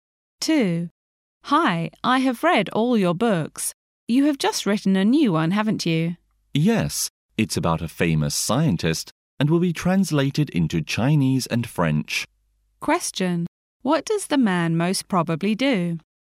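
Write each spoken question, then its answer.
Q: What does the man most probably do?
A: He is a writer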